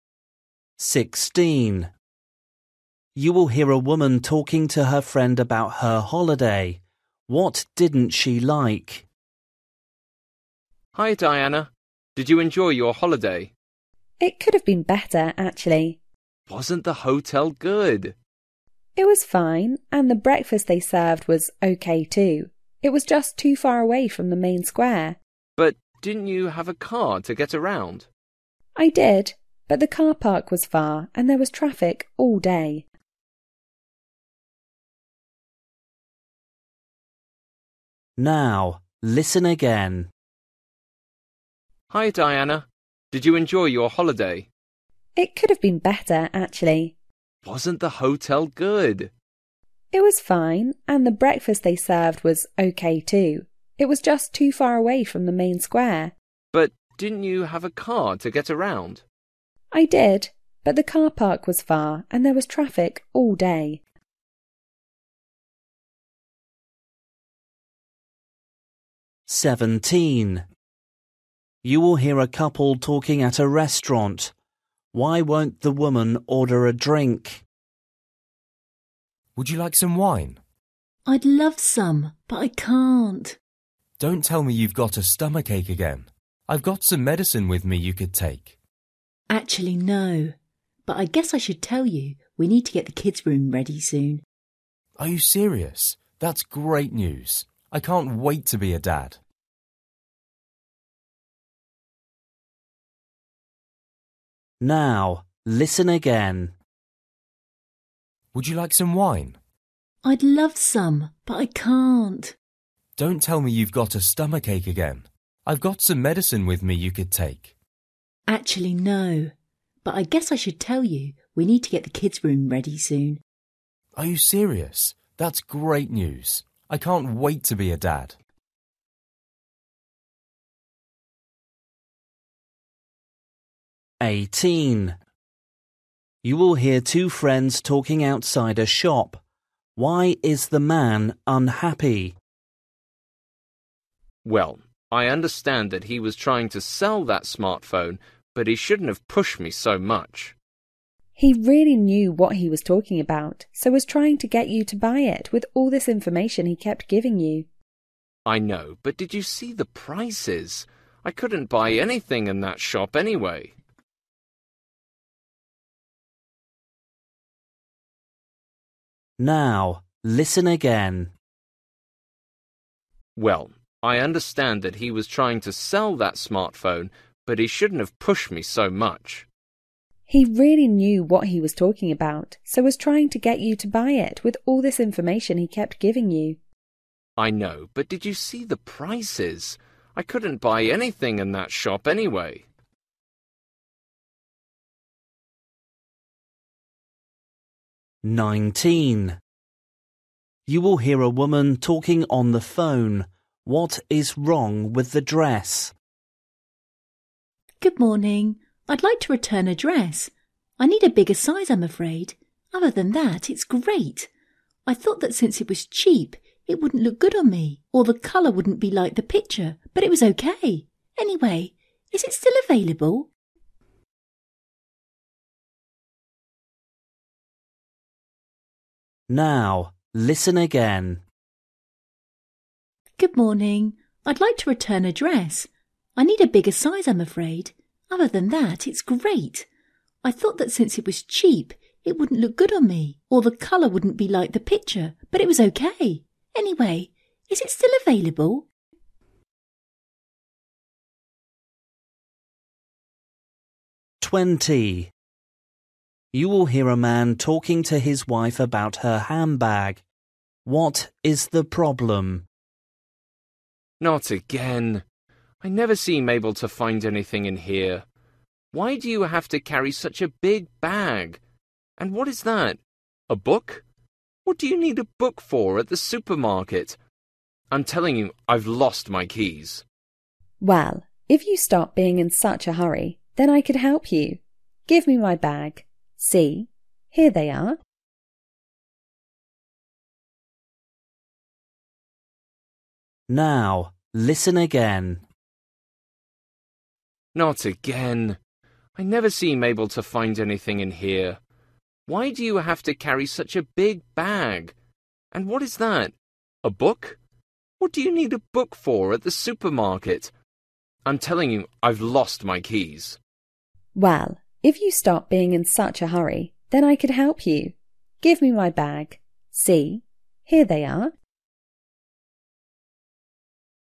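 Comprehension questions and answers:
For each question, choose the correct answer.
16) You will hear a woman talking to her friend about her holiday. What didn't she like?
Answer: The hotel was too far from the main square

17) You will hear a couple talking at a restaurant. Why won't the woman order a drink?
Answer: She is pregnant

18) You will hear two friends talking outside a shop. Why is the man unhappy?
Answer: The shop assistant pushed him too much to buy

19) You will hear a woman talking on the phone. What is wrong with the dress?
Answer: It is too small

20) You will hear a man talking to his wife about her handbag. What is the man's problem?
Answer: He can't find his keys

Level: Luyện nghe trình độ A2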